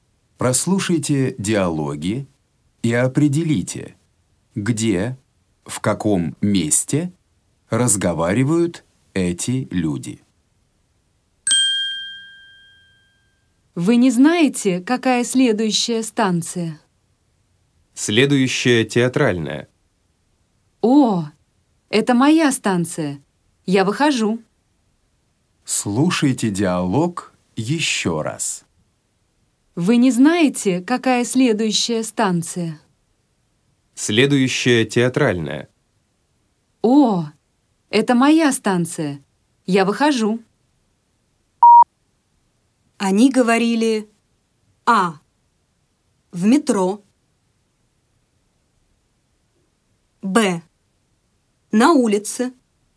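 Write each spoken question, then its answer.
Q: Они говорили:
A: А: В метро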